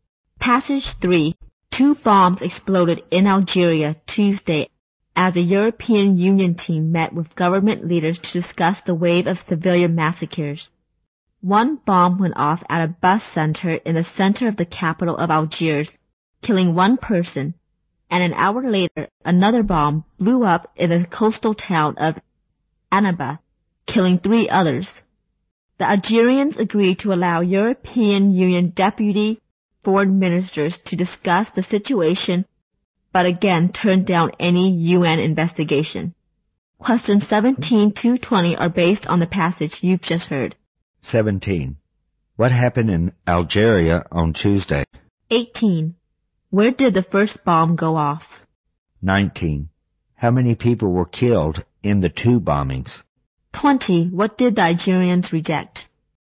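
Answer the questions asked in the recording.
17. Two bombs exploded
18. At a bus center in the capital, Algiers
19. Four
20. A UN investigation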